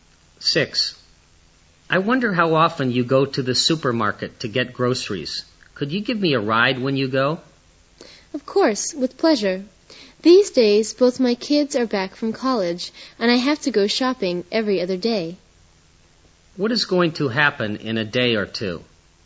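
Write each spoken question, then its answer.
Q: What is going to happen in a day or two?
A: The woman will go shopping and give the man a ride to the supermarket.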